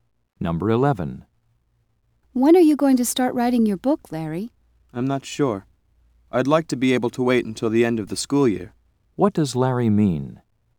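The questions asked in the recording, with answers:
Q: What does Larry mean?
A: He wants to wait until the school year ends to start.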